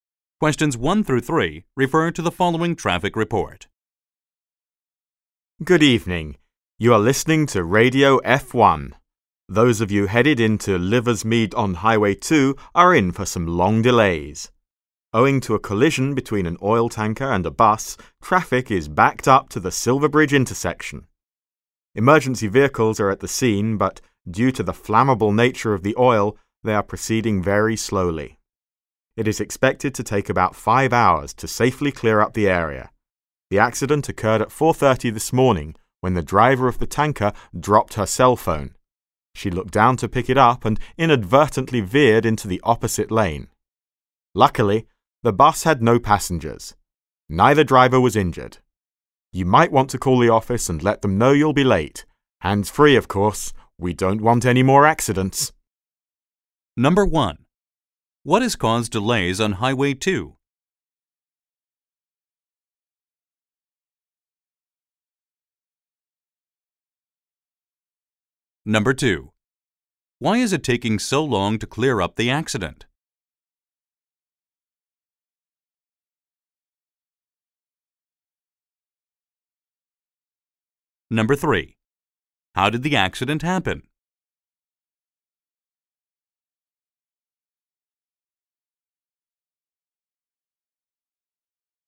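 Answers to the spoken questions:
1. A collision between an oil tanker and a bus
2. The oil is flammable, so emergency vehicles proceed slowly
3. The tanker driver dropped her cell phone, looked down and veered into the opposite lane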